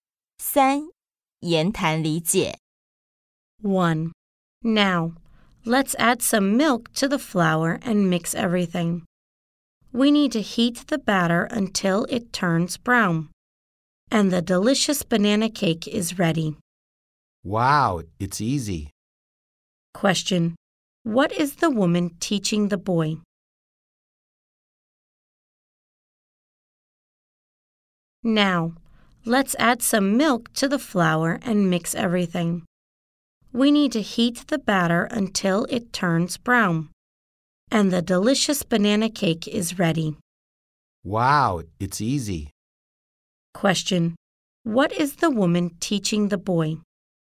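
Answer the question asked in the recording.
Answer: How to make a banana cake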